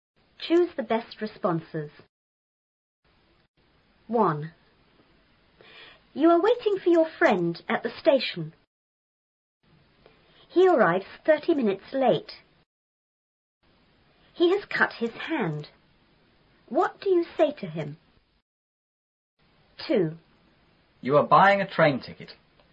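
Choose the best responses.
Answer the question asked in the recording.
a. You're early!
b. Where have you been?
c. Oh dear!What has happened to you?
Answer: c. Oh dear!What has happened to you?

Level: 初中英语广州版4B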